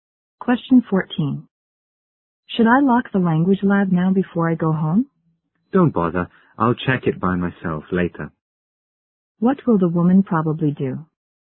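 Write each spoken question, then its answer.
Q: What will the woman probably do?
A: Check (lock) the language lab herself later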